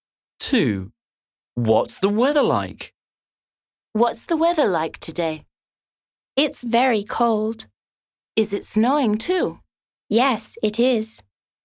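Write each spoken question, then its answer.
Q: What's the weather like?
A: It's very cold and snowing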